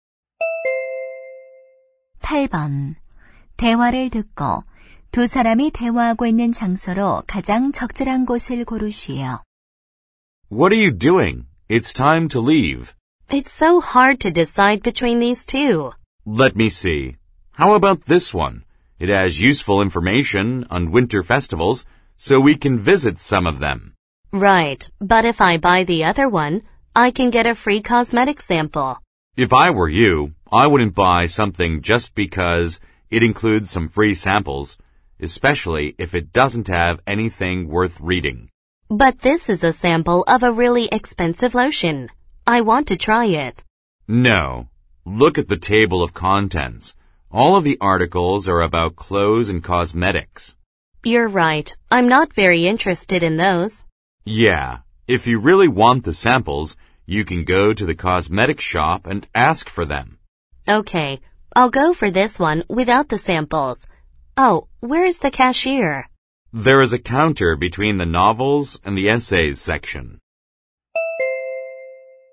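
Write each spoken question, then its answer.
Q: 대화를 듣고 두 사람이 대화하고 있는 장소로 가장 적절한 곳을 고르시오.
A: 서점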